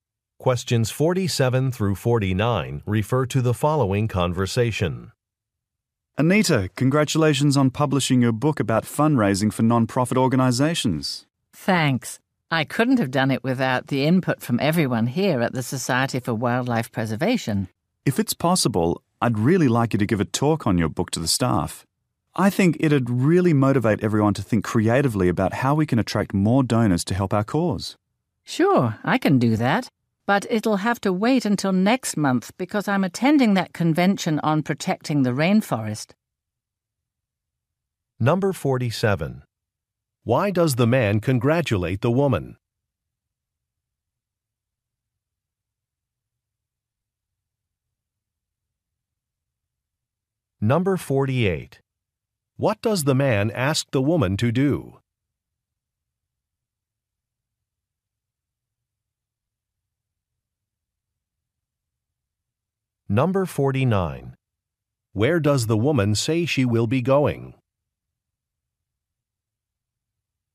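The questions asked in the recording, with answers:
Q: Why does the man congratulate the woman?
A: She published a book

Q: What does the man ask the woman to do?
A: Give a talk on her book to the staff

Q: Where does the woman say she will be going?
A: To a convention on protecting the rainforest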